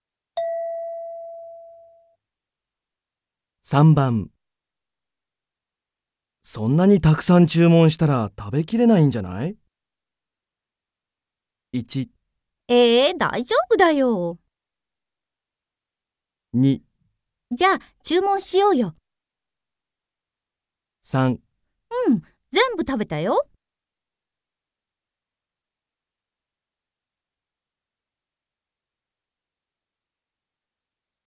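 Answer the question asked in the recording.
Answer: えー、大丈夫だよ。

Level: N3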